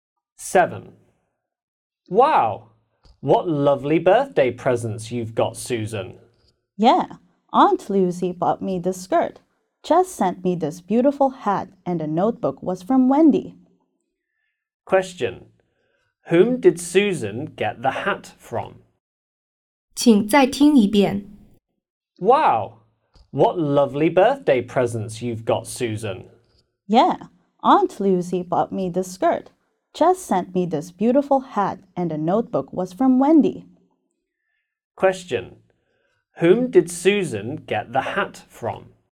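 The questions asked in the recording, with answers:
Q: Whom did Susan get the hat from?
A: Jess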